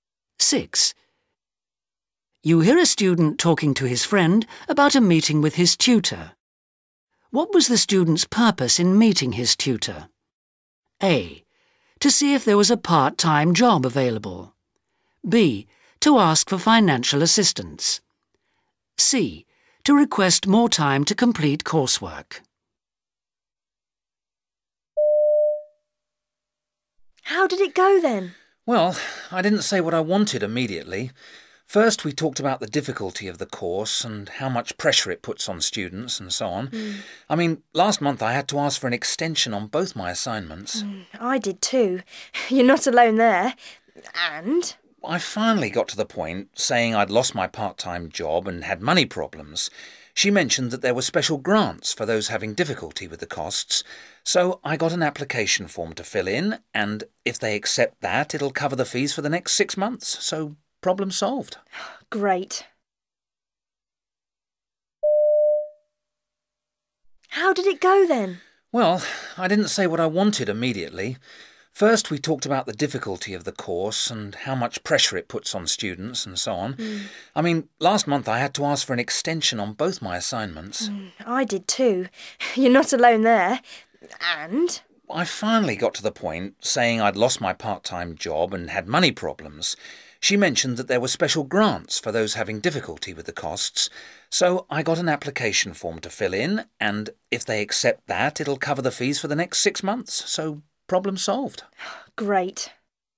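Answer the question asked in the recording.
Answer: B: To ask for financial assistance.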